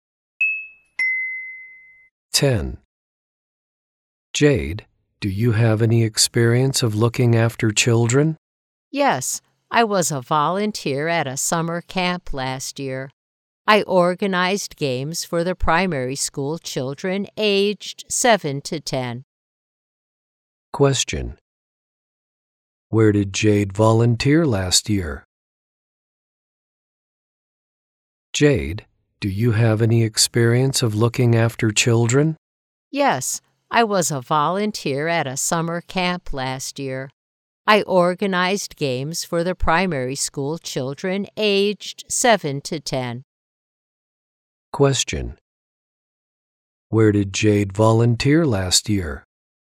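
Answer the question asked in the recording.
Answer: At a summer camp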